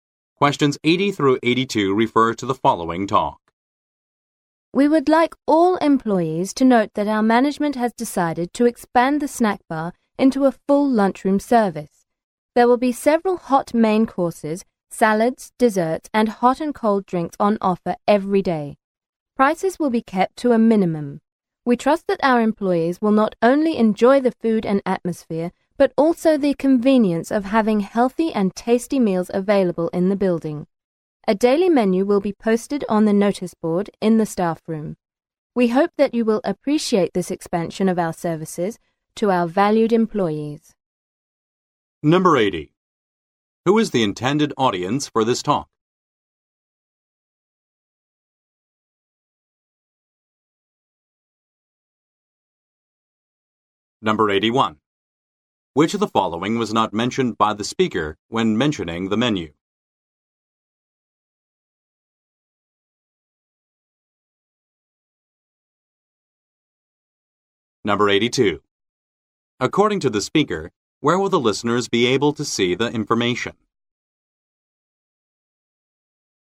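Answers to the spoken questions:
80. Company employees
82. On the notice board in the staff room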